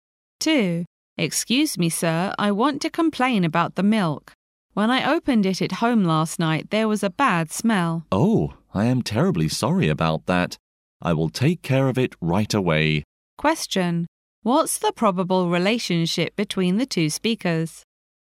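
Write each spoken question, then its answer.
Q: What's the probable relationship between the two speakers?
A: Customer and shop assistant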